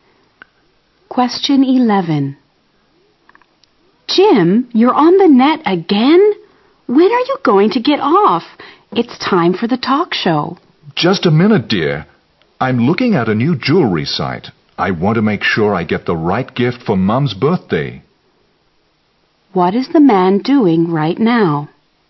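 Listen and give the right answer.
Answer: Looking at a jewelry website online for a birthday gift for Mum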